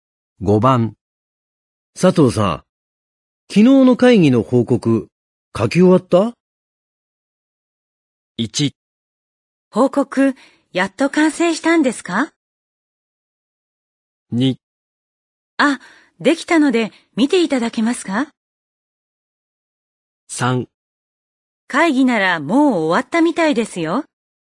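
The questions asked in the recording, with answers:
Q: 佐藤さん、昨日の会議の報告書き終わった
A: 2: あ、できたので見ていただけますか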